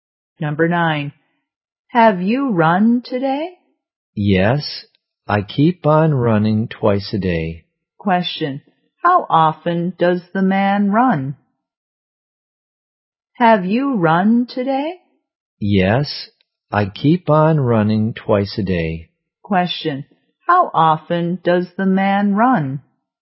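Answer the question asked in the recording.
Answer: Twice a day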